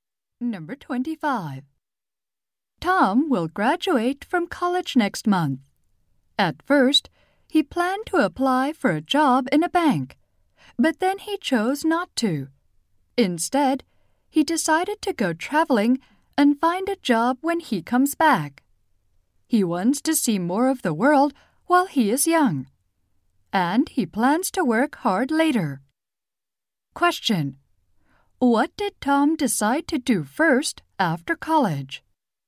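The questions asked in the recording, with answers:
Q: Question. What did Tom decide to do first after college?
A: Go traveling.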